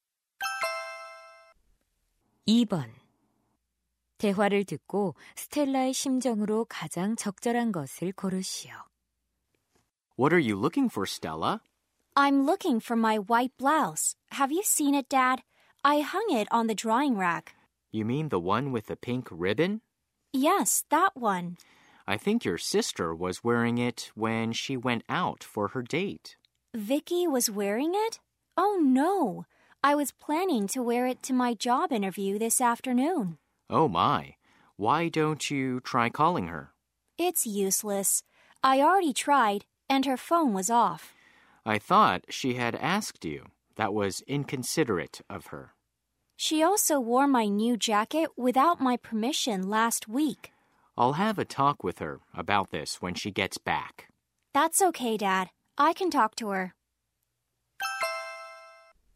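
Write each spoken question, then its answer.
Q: 대화를 듣고 스텔라의 심정으로 가장 적절한 것을 고르시오.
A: 짜증난, 화난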